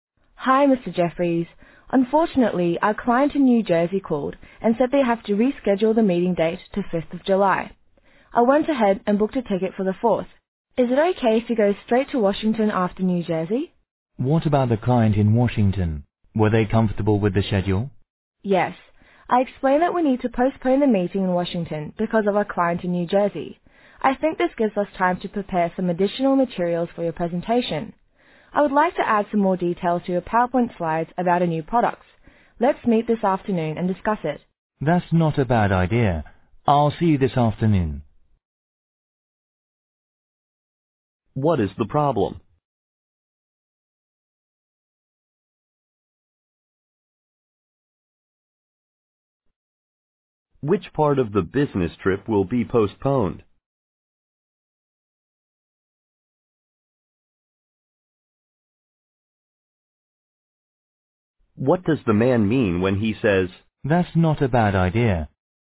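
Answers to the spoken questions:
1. The New Jersey client rescheduled the meeting to July 5th
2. The meeting in Washington
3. He agrees to add new product details to the slides and meet this afternoon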